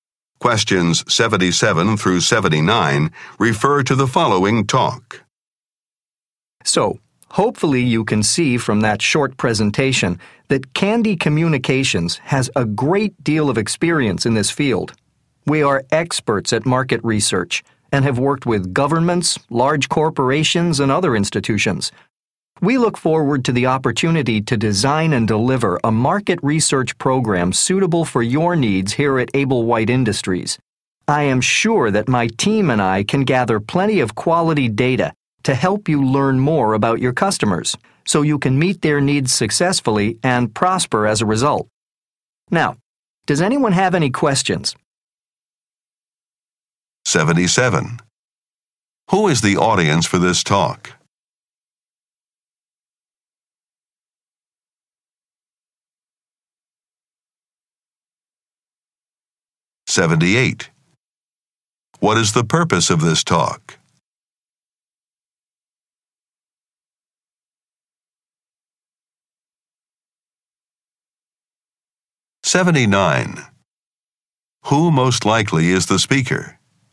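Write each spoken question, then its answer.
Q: Who is the audience for this talk?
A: Staff of Able White Industries (potential clients)

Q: What is the purpose of this talk?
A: To win a market research contract

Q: Who most likely is the speaker?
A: A market research consultant at Candy Communications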